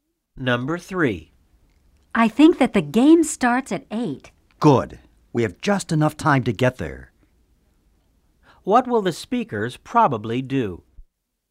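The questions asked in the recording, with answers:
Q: What will the speakers probably do?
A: Go to the game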